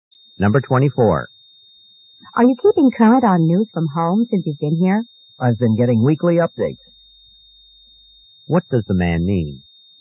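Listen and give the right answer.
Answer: He gets news from home every week.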